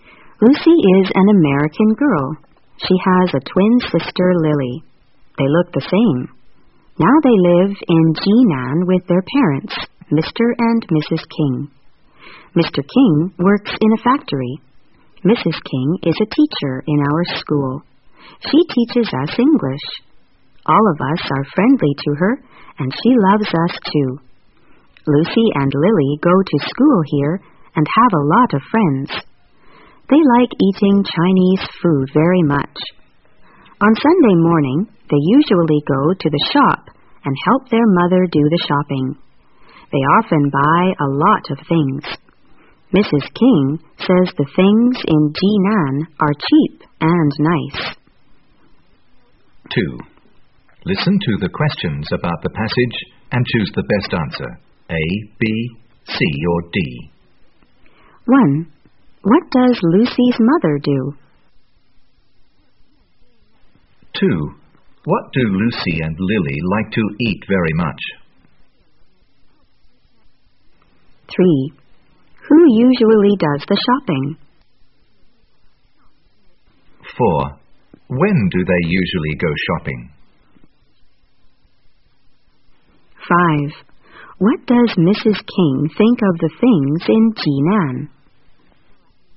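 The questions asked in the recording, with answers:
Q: What does Lucy's mother do?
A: She is a teacher (she teaches English).

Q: What do Lucy and Lily like to eat very much?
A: Chinese food

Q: When do they usually go shopping?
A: On Sunday morning

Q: What does Mrs. King think of the things in Jinan?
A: They are cheap and nice.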